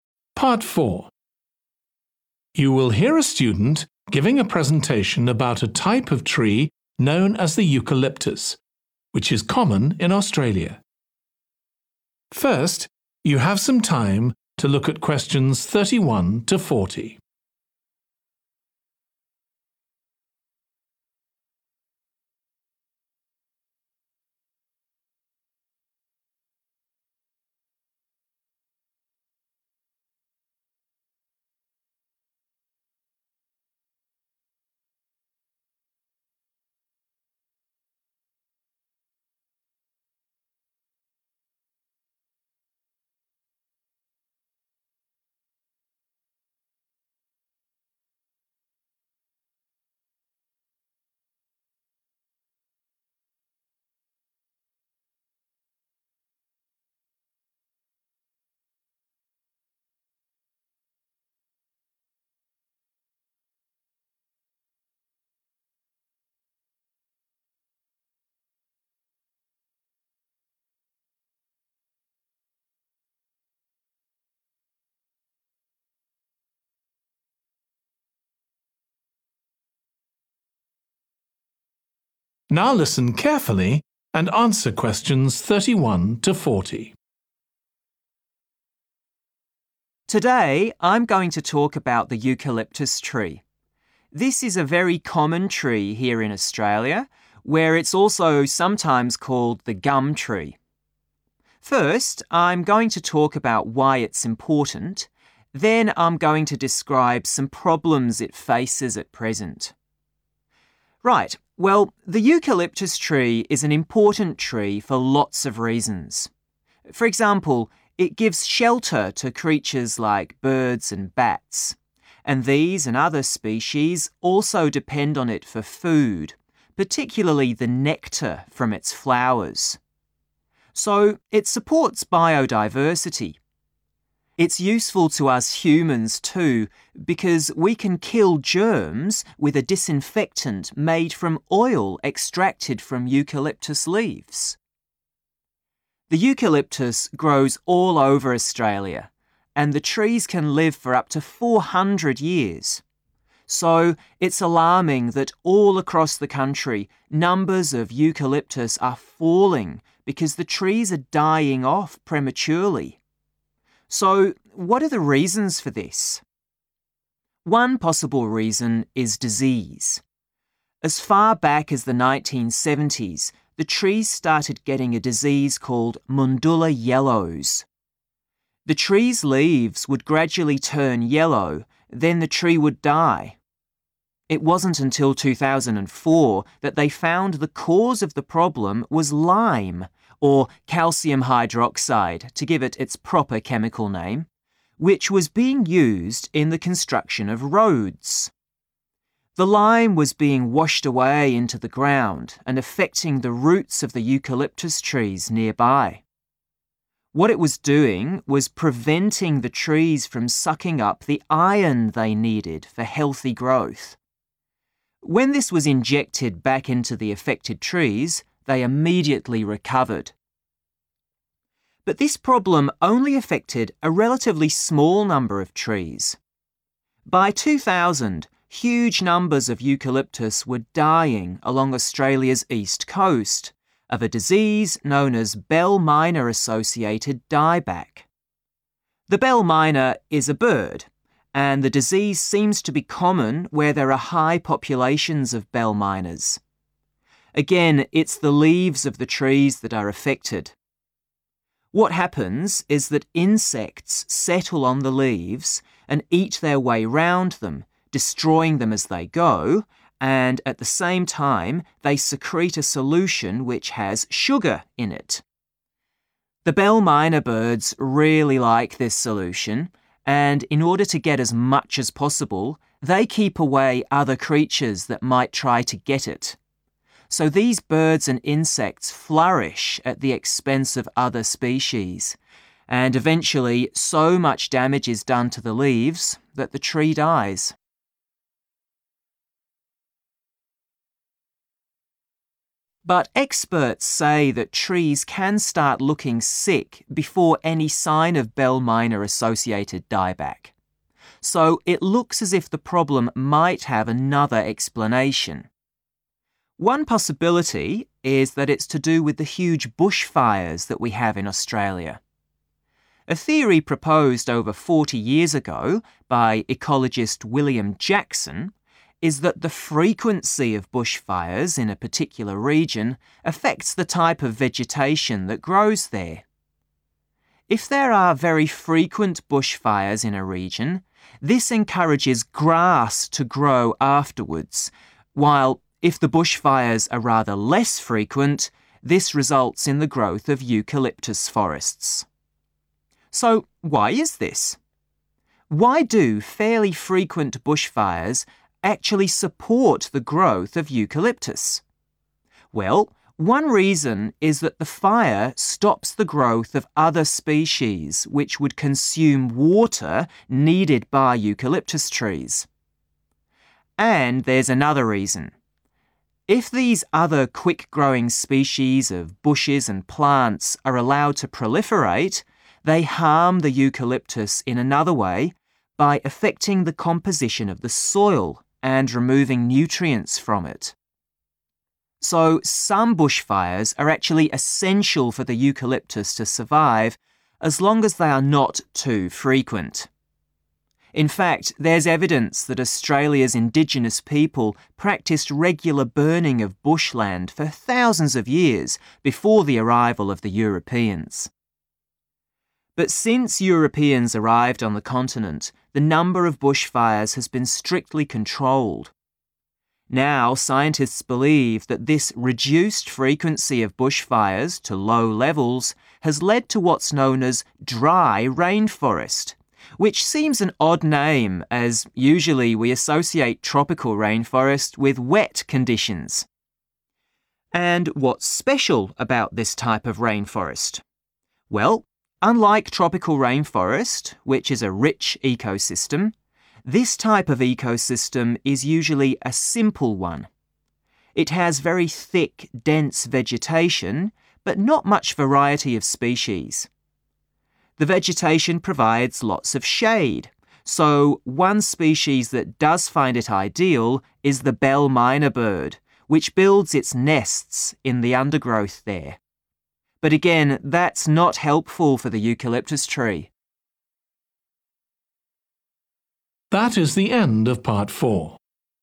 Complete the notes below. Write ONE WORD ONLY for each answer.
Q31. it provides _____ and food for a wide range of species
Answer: shelter

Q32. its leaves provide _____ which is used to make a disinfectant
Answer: oil

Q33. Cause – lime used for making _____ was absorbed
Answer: roads

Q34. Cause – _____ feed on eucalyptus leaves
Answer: insects

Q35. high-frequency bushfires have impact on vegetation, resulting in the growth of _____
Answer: grass / grasses

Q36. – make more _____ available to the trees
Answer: water

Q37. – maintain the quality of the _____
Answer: soil

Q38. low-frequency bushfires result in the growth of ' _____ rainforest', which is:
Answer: dry

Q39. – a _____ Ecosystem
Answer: simple

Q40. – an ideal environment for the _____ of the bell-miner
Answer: nest / nests

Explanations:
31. The correct answer is 'shelter' because the Eucalyptus tree serves as a place of protection for creatures like birds and bats, as mentioned in the excerpt.
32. The correct answer is 'oil' because the excerpt specifically states that the disinfectant is made from oil extracted from eucalyptus leaves, linking the importance of eucalyptus leaves to the production of this germ-killing substance.
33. The correct answer is 'roads' because it directly relates to the lime being used in road construction as mentioned in the provided excerpt.
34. The correct answer is 'insects' because it matches the description of creatures settling on the leaves and destroying them by eating through them, as well as secreting a solution with sugar content, as mentioned in the transcript excerpt.
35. The correct answer is 'grass' because the singular form 'grass' is referring to the collective plural form 'grasses' mentioned in the excerpt. It simplifies the concept that multiple grass types grow after high-frequency bushfires.
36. The correct answer 'water' aligns with the idea presented in the excerpt that other plants consuming water is a problem for eucalyptus trees. Since water is crucial for the growth and health of all plants, including eucalyptus trees, this aligns perfectly with the context provided in the transcript.
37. The correct answer 'soil' is supported by the excerpt stating that bushfires impact the composition of the soil. Soil plays a crucial role in providing essential nutrients to trees and other vegetation, which influences their growth and survival.
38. The correct answer is 'dry' because it directly corresponds to the term used in the quote, showing that even though we usually think of rainforests as damp, the specific type mentioned here is 'dry rainforest.' This highlights the unusual characteristic of this particular type of rainforest.
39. The correct answer aligns with the concept explained in the excerpt that the ecosystem being referred to is not complex but rather straightforward and lacking in diversity, making it a simple ecosystem.
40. The correct answer is 'nest' because the excerpt specifically mentions the bell-miner bird building its nests in the undergrowth. This aligns perfectly with the concept of birds creating nests as a shelter for themselves and their offspring.

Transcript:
Today I'm going to talk about the eucalyptus tree. This is a very common tree here in Australia, where it's also sometimes called the gum tree. First I'm going to talk about why it's important, then I'm going to describe some problems it faces at present.
Right, well the eucalyptus tree is an important tree for lots of reasons. For example, it gives shelter to creatures like birds and bats, and these and other species also depend on it for food, particularly the nectar from its flowers. So it supports biodiversity. It's useful to us humans too, because we can kill germs with a disinfectant made from oil extracted from eucalyptus leaves.
The eucalyptus grows all over Australia and the trees can live for up to four hundred years. So it's alarming that all across the country, numbers of eucalyptus are falling because the trees are dying off prematurely. So what are the reasons for this?
One possible reason is disease. As far back as the 1970s the trees started getting a disease called Mundulla Yellows. The trees' leaves would gradually turn yellow, then the tree would die. It wasn't until 2004 that they found the cause of the problem was lime, or calcium hydroxide to give it its proper chemical name, which was being used in the construction of roads. The lime was being washed away into the ground and affecting the roots of the eucalyptus trees nearby. What is was doing was preventing the trees from sucking up the iron they needed for healthy growth. When this was injected back into the affected trees, they immediately recovered.
But this problem only affected a relatively small number of trees. By 2000, huge numbers of eucalyptus were dying along Australia's East Coast, of a disease known as Bell-miner Associated Die-back. The bell-miner is a bird, and the disease seems to be common where there are high populations of bell-miners. Again it's the leaves of the trees that are affected. What happens is that insects settle on the leaves and eat their way round them, destroying them as they go, and at the same time they secrete a solution which has sugar in it. The bell-miner birds really like this solution, and in order to get as much as possible, they keep away other creatures that might try to get it. So these birds and insects flourish at the expense of other species, and eventually so much damage is done to the leaves that the tree dies.
But experts say that trees can start looking sick before any sign of Bell-miner Associated Die-back. So it looks as if the problem might have another explanation. One possibility is that it's to do with the huge bushfires that we have in Australia. A theory proposed over 40 years ago be ecologist William Jackson is that the frequency of bushfires in a particular region affects the type of vegetation that grows there. If there are very frequent bushfires in a region, this encourages grass to grow afterwards, while if the bushfires are rather less frequent, this results in the growth of eucalyptus forests.
So why is this? Why do fairly frequent bushfires actually support the growth of eucalyptus? Well, one reason is that the fire stops the growth of other species which would consume water needed by eucalyptus trees. And there's another reason. If these other quick-growing species of bushes and plants are allowed to proliferate, they harm the eucalyptus in another way, by affecting the composition of the soil, and removing nutrients from it. So some bushfires are actually essential for the eucalyptus to survive as long as they are not too frequent. In fact there's evidence that Australia's indigenous people practised regular burning of bush land for thousands of years before the arrival of the Europeans.
But since Europeans arrived on the continent, the number of bushfires has been strictly controlled. Now scientists believe that this reduced frequency of bushfires to low levels had led to what's known as 'dry rainforest', which seems an odd name as usually we associate tropical rainforest with wet conditions. And what's special about this type of rainforest? Well, unlike tropical rainforest which is a rich ecosystem, this type of ecosystem is usually a simple one. It has very thick, dense vegetation, but not much variety of species. The vegetation provides lots of shade, so one species that does find it ideal is the bell-miner bird, which builds its nests in the undergrowth there. But again that's not helpful for the eucalyptus tree.